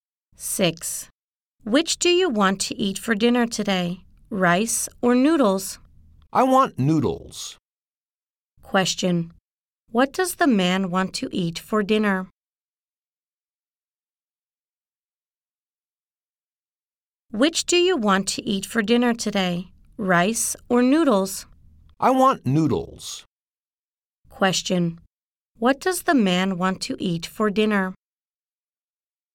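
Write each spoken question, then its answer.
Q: Question, what does the man want to eat for dinner?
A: Noodles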